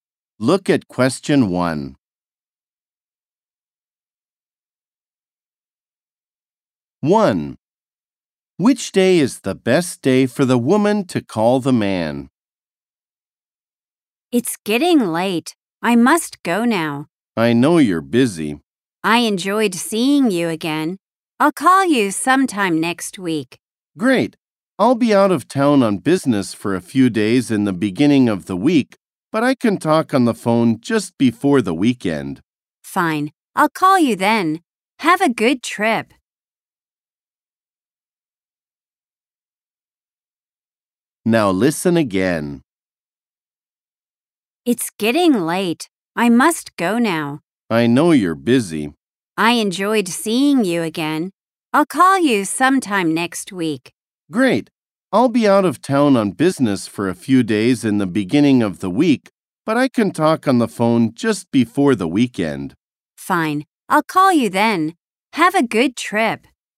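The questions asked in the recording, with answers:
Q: Which day is the best day for the woman to call the man?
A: Friday (just before the weekend)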